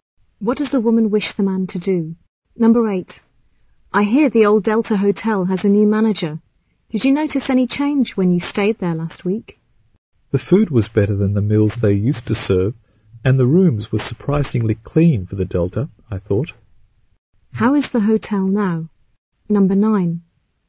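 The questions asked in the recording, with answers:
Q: How is the hotel now?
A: Better: better food and clean rooms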